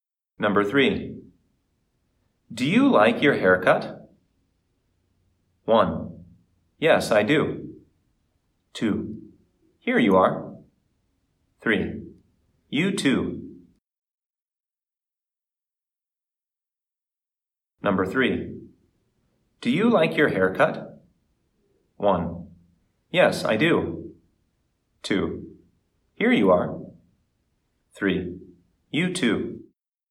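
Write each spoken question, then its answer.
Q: Do you like your haircut?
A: 1: Yes, I do.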